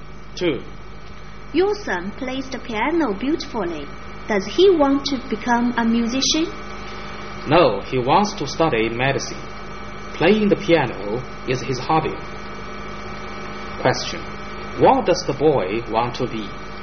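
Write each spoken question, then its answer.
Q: What does the boy want to be?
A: A doctor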